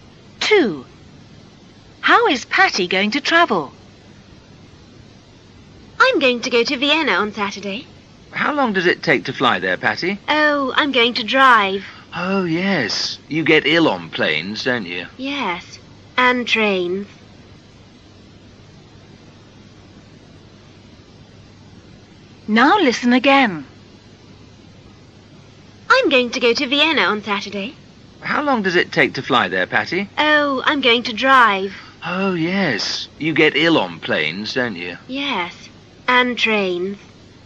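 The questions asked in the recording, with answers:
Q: How is Patty going to travel?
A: By car (she's going to drive)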